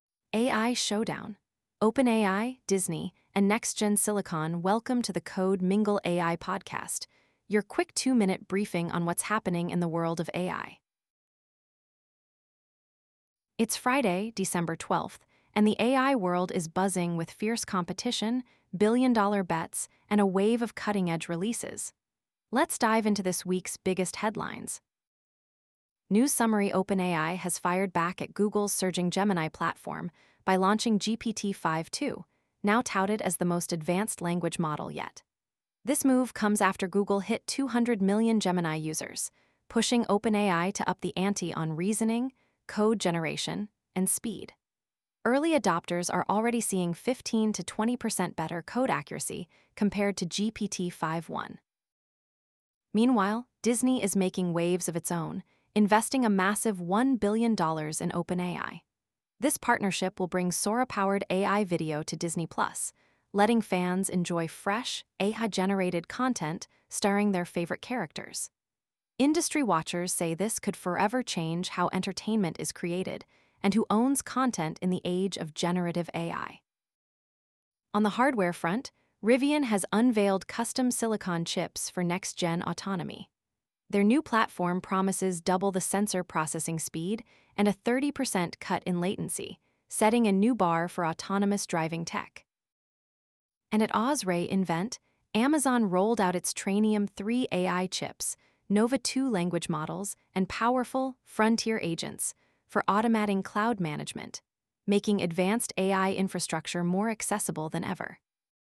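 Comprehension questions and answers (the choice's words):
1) What was the primary motivation for OpenAI's launch of GPT-5.2?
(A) To expand into the hardware market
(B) To respond to Google's Gemini reaching 200 million users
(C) To partner with Disney on AI video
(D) To focus on robotics and video world models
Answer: To respond to Google's Gemini reaching 200 million users

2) What is a notable improvement of GPT-5.2 over GPT-5.1 according to early users?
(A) 20% faster video rendering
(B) 15-20% improvement in code accuracy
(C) 50% reduction in data usage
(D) Enhanced image generation capabilities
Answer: 15-20% improvement in code accuracy

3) How much did Disney invest in OpenAI as part of their new partnership?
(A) $500 million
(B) $2 billion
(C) $1 billion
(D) $100 million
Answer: $1 billion

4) What is the expected impact of Disney's partnership with OpenAI on the entertainment industry?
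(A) It will slow down AI adoption in Hollywood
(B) It will set a new precedent for content rights and AI media creation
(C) It will eliminate the need for human actors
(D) It will focus solely on theme park automation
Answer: It will set a new precedent for content rights and AI media creation

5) Which company recently unveiled custom silicon for next-generation autonomy?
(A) Google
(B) OpenAI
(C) Rivian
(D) AWS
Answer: Rivian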